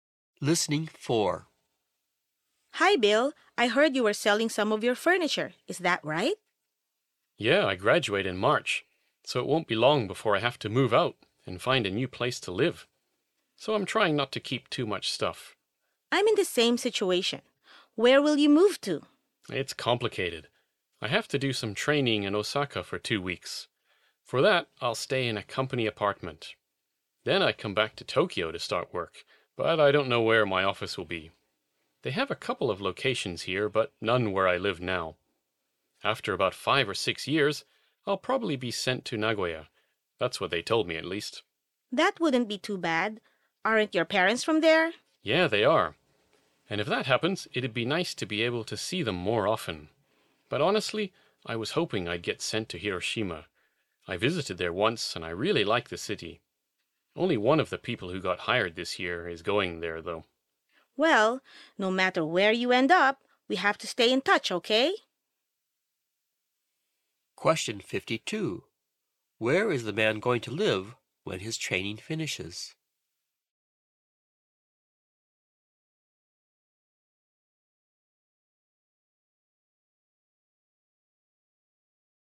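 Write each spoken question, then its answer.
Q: Where is the man going to live when his training finishes?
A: In Tokyo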